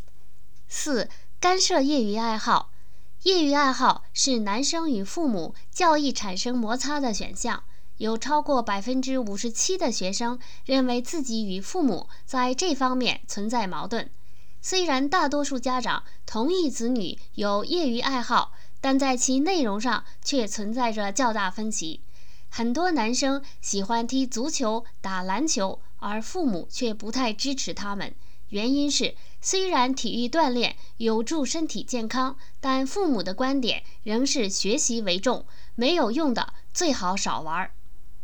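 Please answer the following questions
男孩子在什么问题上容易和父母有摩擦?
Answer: 业余爱好(如踢足球、打篮球)

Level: 3rd Year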